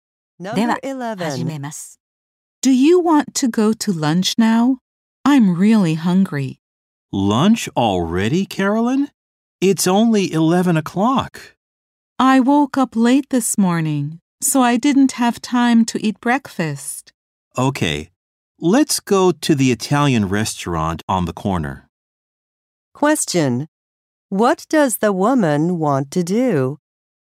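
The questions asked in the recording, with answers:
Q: Question: What does the woman want to do?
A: Have lunch early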